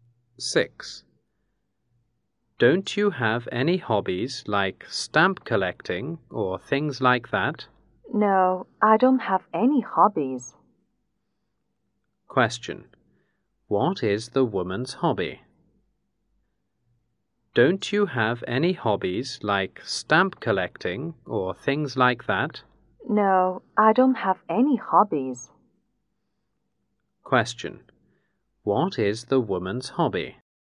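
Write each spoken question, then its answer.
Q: What is the woman's hobby?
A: She has no hobbies.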